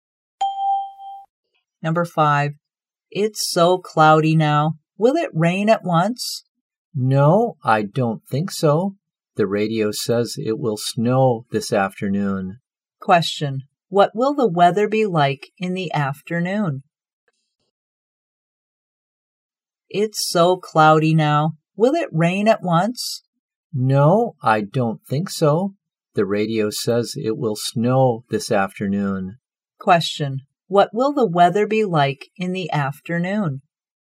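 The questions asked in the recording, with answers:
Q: What will the weather be like in the afternoon?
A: Snowy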